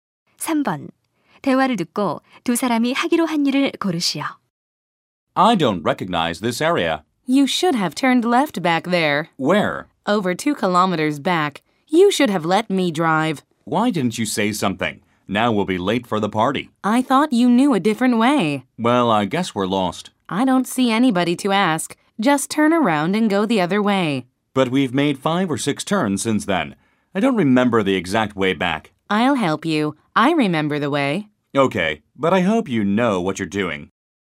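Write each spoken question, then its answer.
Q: 대화를 듣고 두 사람이 하기로 한 일을 고르시오.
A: 차를 돌려 왔던 길로 되돌아가기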